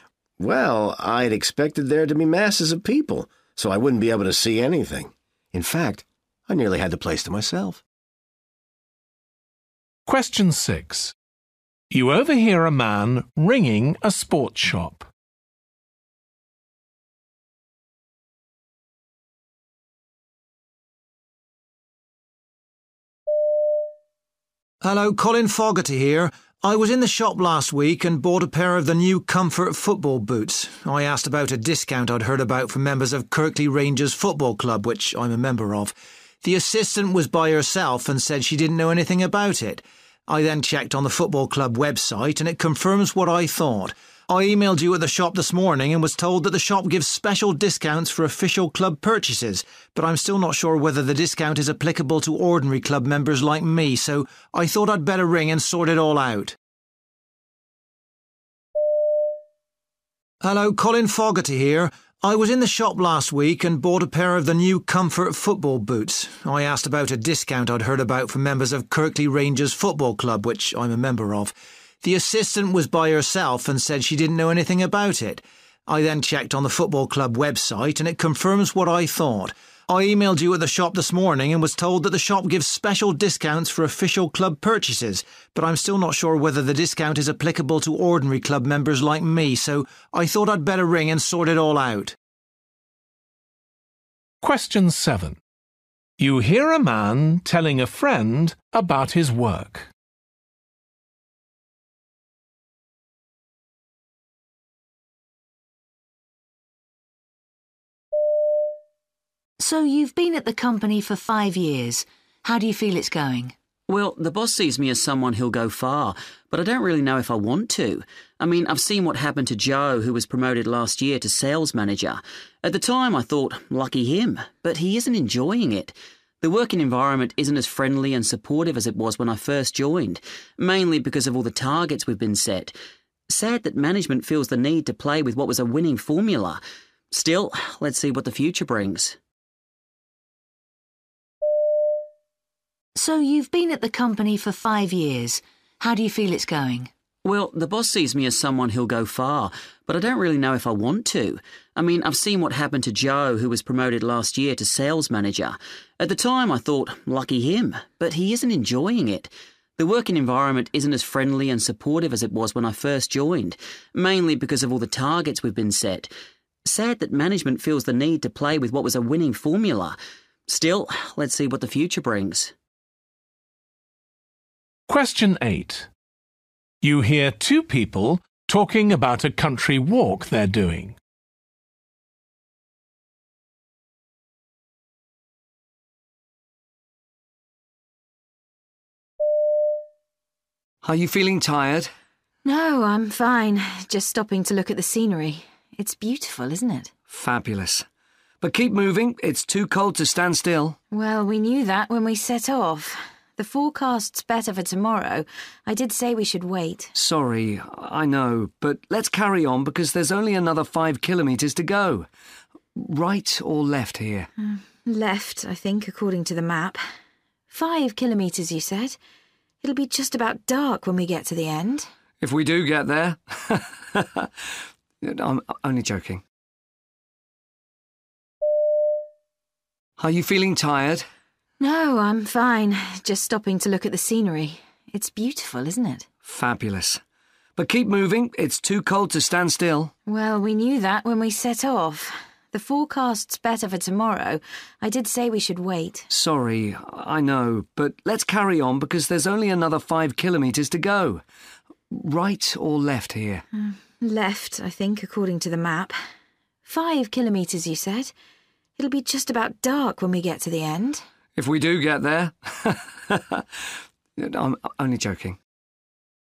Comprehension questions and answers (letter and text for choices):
For questions 1-8, choose the best answer A, B or C.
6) Why is he calling?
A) to report an incident in the shop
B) to make a special order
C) to follow up an earlier query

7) How does the man feel about his work?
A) resentment of his colleague's success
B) regret at the changes that have taken place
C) frustration at his lack of progress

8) What do they agree about?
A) It's much too long to complete.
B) The path is very difficult to follow.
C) They've chosen the wrong day to do it.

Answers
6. C) to follow up an earlier query
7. B) regret at the changes that have taken place
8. C) They've chosen the wrong day to do it.

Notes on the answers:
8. The forecast's better for tomorrow. I did say we should wait.

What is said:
Man: Well, I'd expected there to be masses of people, so I wouldn't be able to see anything. In fact, I nearly had the place to myself.
6
Man: Hello. Colin Foggerty here. I was in the shop last week, and bought a pair of the new Comfort football boots. I asked about a discount I'd heard about for members of Kirkley Rangers football club, which I'm a member of. The assistant was by herself and said she didn't know anything about it. I then checked on the football club website, and it confirms what I thought. I emailed you at the shop this morning and was told that the shop gives special discounts for official club purchases, but I'm still not sure whether the discount is applicable to ordinary club members like me. So I thought I'd better ring and sort it all out.
7
Woman: So you've been at the company for five years, how do you feel it's going?
Man: Well, the boss sees me as someone who'll go far but I don't really know if I want to. I mean I've seen what happened to Joe who was promoted last year to sales manager. At the time, I thought 'lucky him', but he isn't enjoying it. The working environment isn't as friendly and supportive as it was when I first joined – mainly because of all the targets we've been set. Sad that management feels the need to play with that was a winning formula. Still, let's see what the future brings.
8
Man: Are you feeling tired?
Woman: No, I'm fine, just stopping to look at the scenery. It's beautiful, isn't it?
Man: Fabulous, but keep moving – it's too cold to stand still.
Woman: Well, we knew that when we set off. The forecast's better for tomorrow. I did say we should wait.
Man: Sorry, I know, but let's carry on because there's only another five kilometres to go. Right or left here?
Woman: Left, I think, according to the map. Five kilometres you said? It'll be just about dark when we get to the end.
Man: If we do get there! I'm only joking!